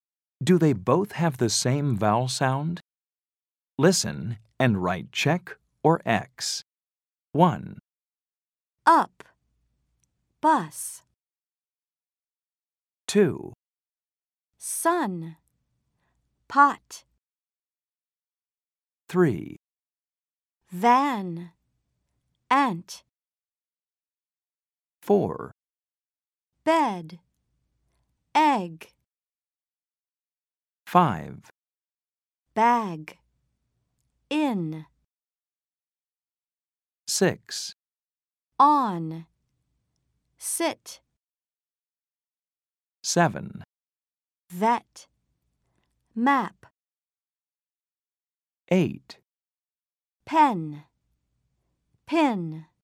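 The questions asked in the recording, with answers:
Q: Do they both have the same vowel sound?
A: Yes (up, bus)

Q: Do they both have the same vowel sound?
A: No (sun, pot)

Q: Do they both have the same vowel sound?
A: Yes (van, ant)

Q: Do they both have the same vowel sound?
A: Yes (bed, egg)

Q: Do they both have the same vowel sound?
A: No (bag, in)

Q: Do they both have the same vowel sound?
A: No (on, sit)

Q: Do they both have the same vowel sound?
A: No (vet, map)

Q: Do they both have the same vowel sound?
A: No (pen, pin)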